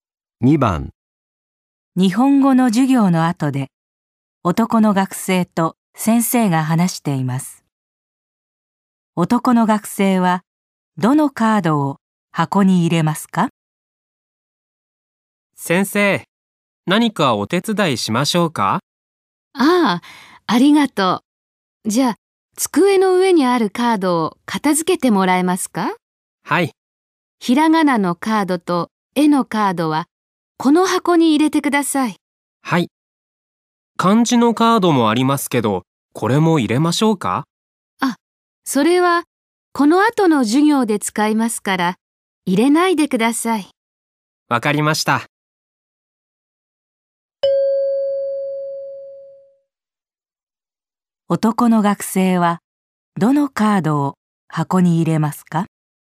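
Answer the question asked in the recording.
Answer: ひらがなのカードと絵のカード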